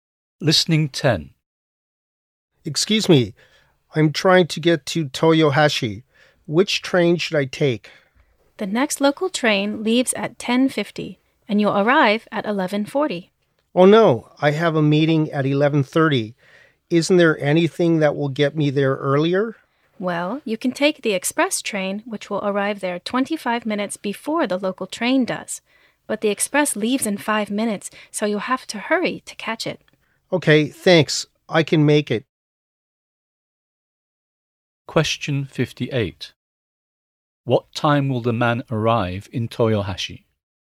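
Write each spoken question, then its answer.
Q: What time will the man arrive in Toyohashi?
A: 11:15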